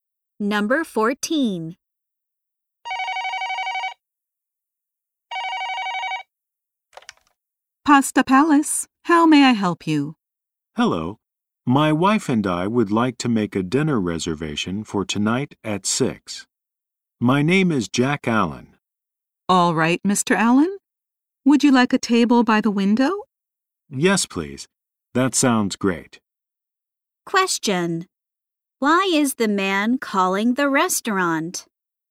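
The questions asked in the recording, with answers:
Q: Why is the man calling the restaurant?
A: To make a dinner reservation.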